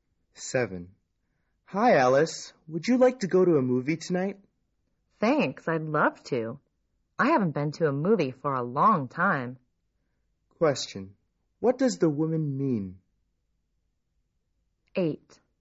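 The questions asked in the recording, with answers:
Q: What does the woman mean?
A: She would love to go to a movie tonight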